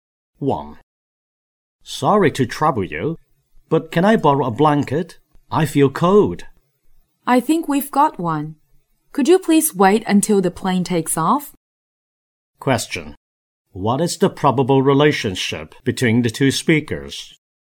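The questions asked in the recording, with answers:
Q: What is the probable relationship between the two speakers?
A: Passenger and flight attendant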